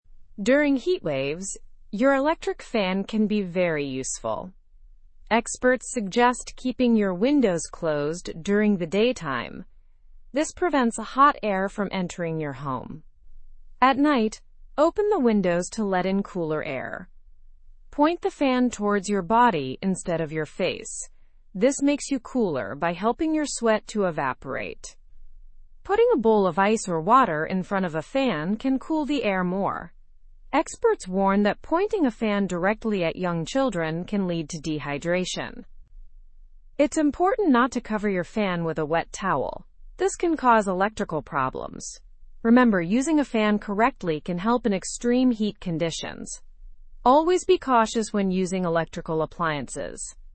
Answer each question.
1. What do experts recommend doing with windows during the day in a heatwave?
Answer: Keeping windows closed to prevent hot air from entering.

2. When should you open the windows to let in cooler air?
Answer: At night.

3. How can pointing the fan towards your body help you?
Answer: It helps cool you by helping your sweat to evaporate.

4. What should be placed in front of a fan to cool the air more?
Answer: A bowl of ice or water.

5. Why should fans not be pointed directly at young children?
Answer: Because it can lead to dehydration.

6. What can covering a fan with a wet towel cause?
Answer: Electrical problems.

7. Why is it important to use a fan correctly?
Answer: To help in extreme heat conditions and avoid electrical issues.

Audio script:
During heatwaves, your electric fan can be very useful. Experts suggest keeping your windows closed during the daytime. This prevents hot air from entering your home. At night, open the windows to let in cooler air.
Point the fan towards your body instead of your face. This makes you cooler by helping your sweat to evaporate. Putting a bowl of ice or water in front of a fan can cool the air more. Experts warn that pointing a fan directly at young children can lead to dehydration.
It's important not to cover your fan with a wet towel. This can cause electrical problems. Remember, using a fan correctly can help in extreme heat conditions. Always be cautious when using electrical appliances.

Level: (Level 2)